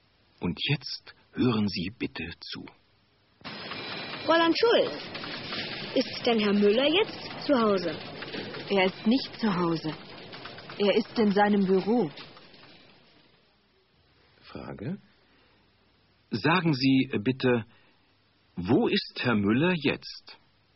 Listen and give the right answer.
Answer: Er ist jetzt in seinem Büro.